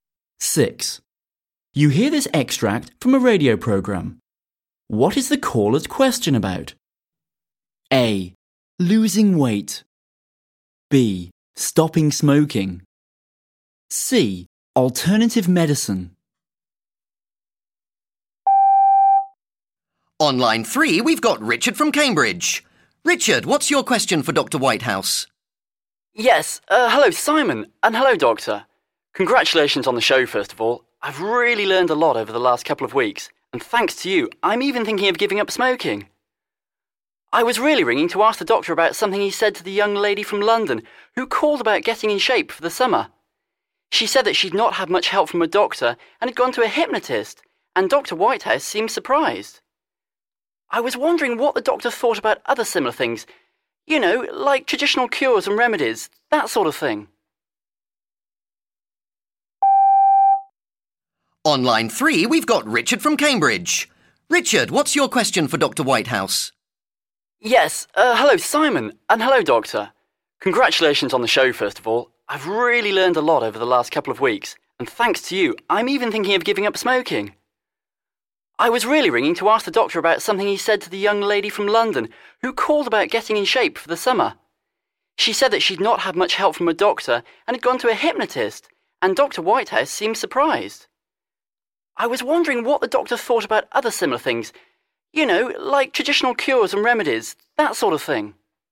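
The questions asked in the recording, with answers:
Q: What is the caller's question about?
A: C: Alternative medicine.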